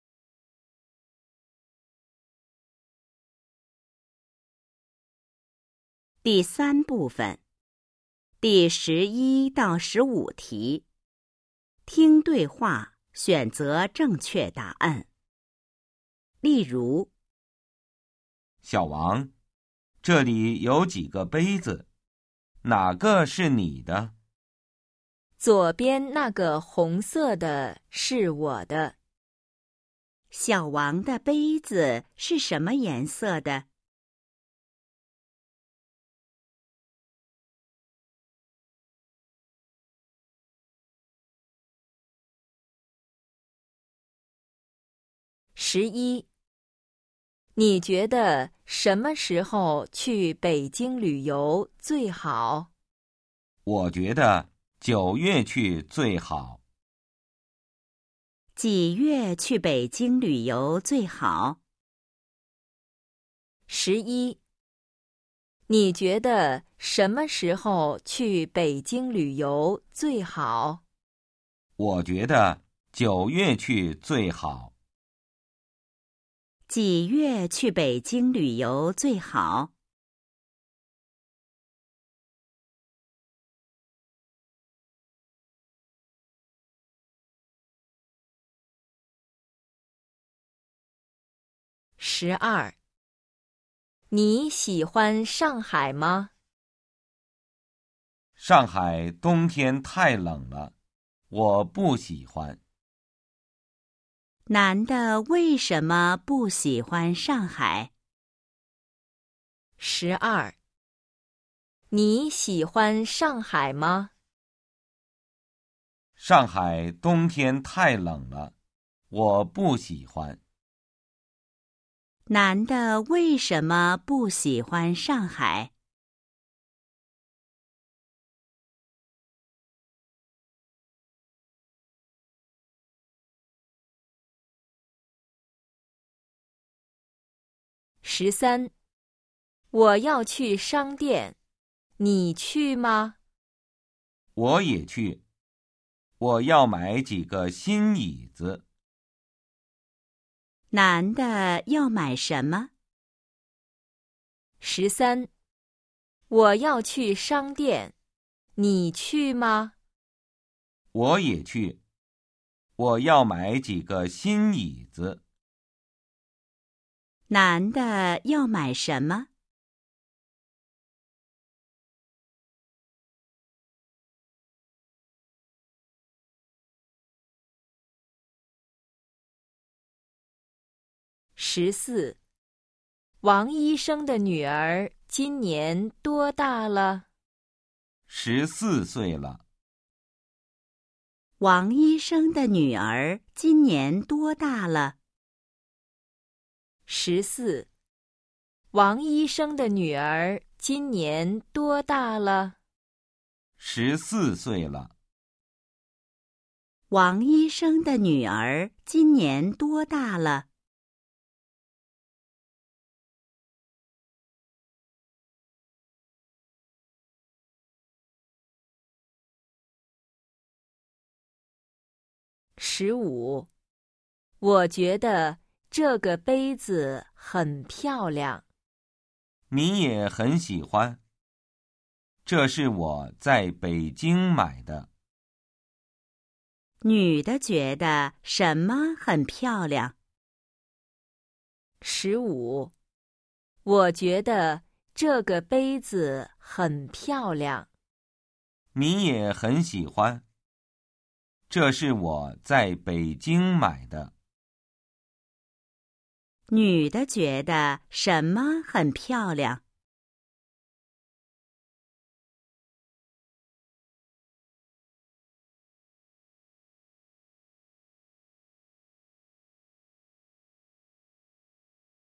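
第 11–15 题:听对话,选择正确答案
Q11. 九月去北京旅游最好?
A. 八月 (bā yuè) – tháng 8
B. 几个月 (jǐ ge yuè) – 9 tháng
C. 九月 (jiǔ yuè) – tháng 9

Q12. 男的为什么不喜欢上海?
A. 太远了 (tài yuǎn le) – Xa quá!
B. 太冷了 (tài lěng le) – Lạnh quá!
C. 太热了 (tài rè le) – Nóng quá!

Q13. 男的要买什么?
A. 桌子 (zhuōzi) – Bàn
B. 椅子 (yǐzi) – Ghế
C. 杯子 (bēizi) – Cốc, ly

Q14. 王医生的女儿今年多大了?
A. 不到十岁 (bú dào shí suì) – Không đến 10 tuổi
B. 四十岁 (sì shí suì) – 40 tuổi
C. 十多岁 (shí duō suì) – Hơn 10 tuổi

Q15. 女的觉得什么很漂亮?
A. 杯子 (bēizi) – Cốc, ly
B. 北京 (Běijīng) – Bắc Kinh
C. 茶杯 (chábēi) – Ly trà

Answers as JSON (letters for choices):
{"11": "C", "12": "B", "13": "B", "14": "C", "15": "A"}

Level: HSK 2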